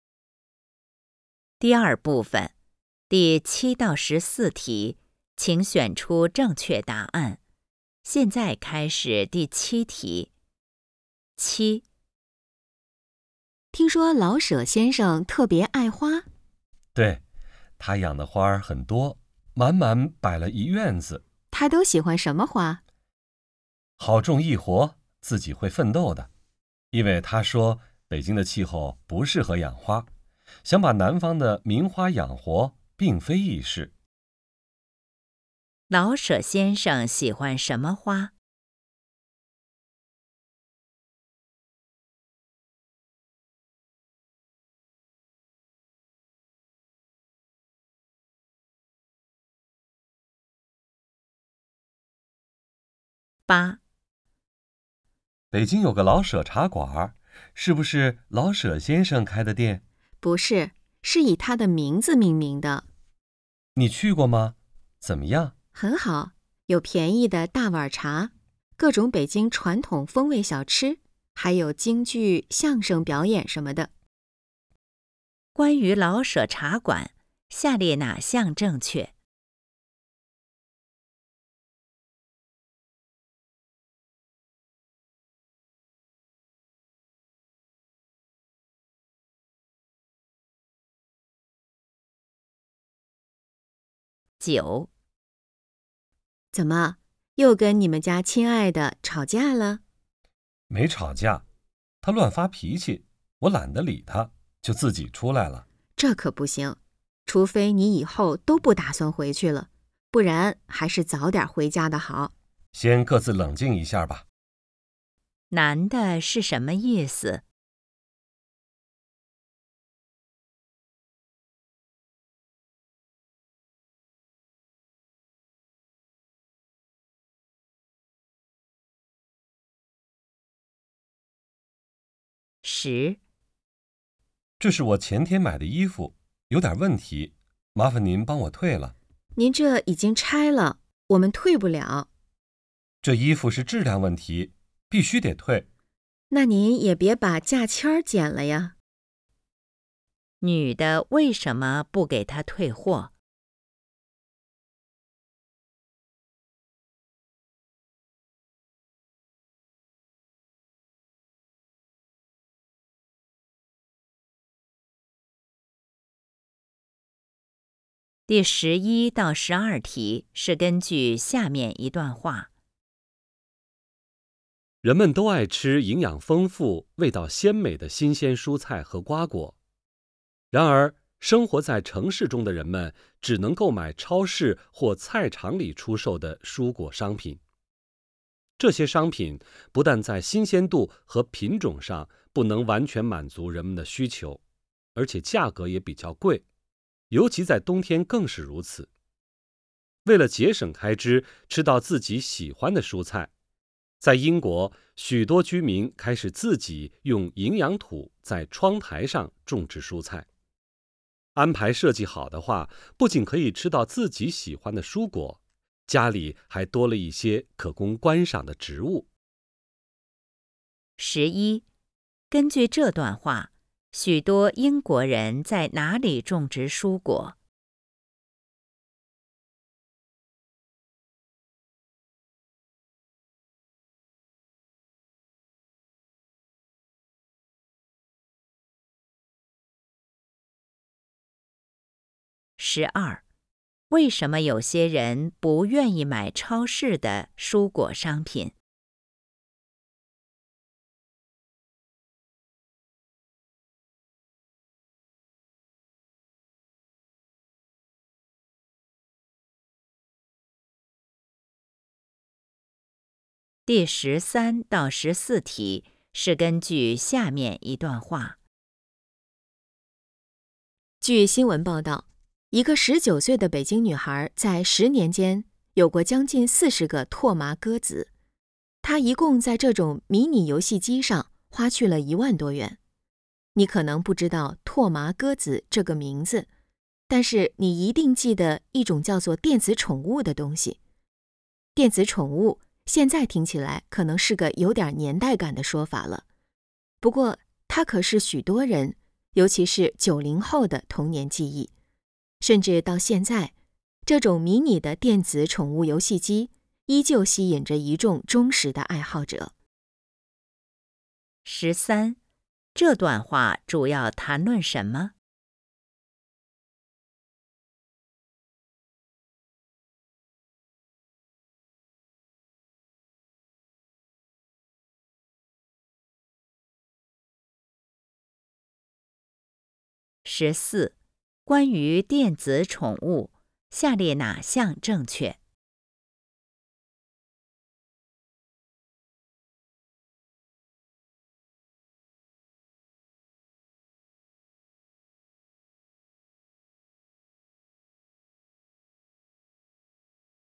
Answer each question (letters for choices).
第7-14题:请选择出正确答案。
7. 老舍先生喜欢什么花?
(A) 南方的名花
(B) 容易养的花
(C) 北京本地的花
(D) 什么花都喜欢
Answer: B

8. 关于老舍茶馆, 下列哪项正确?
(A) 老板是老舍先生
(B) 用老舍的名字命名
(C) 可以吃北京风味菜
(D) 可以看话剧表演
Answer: B

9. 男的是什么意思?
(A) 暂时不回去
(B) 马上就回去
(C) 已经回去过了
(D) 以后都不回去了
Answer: A

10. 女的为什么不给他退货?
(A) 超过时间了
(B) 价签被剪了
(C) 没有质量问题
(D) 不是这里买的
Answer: B

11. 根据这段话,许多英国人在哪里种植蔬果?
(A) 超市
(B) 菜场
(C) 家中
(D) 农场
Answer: C

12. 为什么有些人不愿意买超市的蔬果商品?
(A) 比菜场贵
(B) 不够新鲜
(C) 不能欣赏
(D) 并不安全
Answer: B

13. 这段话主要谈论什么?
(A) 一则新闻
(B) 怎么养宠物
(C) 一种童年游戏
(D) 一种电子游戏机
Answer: D

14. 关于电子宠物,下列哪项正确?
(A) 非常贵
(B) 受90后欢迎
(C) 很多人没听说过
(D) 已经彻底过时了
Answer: B

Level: HSK 5